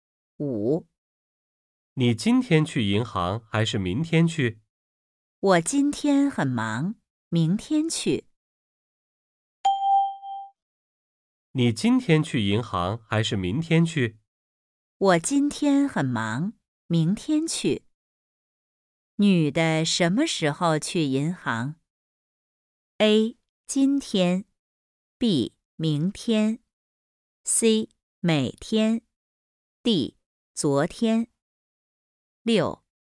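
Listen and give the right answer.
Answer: B: 明天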